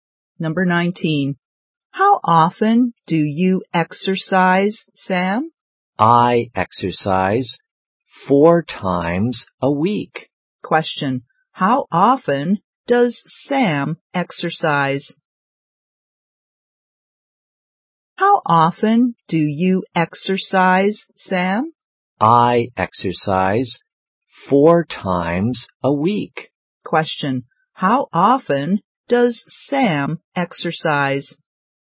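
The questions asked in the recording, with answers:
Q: How often does Sam exercise?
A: Four times a week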